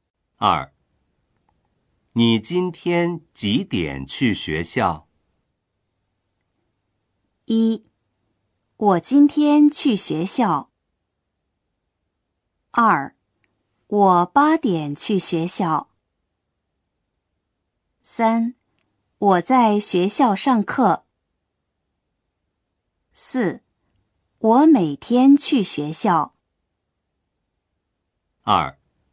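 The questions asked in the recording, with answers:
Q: 你今天几点去学校?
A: 2: 我八点去学校。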